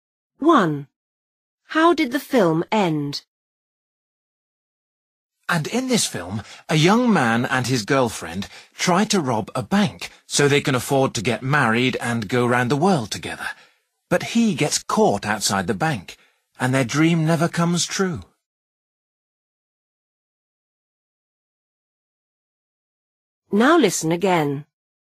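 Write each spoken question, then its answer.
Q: How did the film end?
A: The man got caught outside the bank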